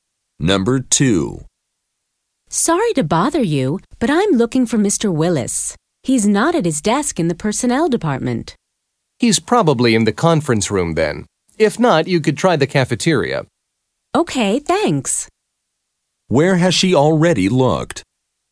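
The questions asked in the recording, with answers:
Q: Where has she already looked?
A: At his desk in the personnel department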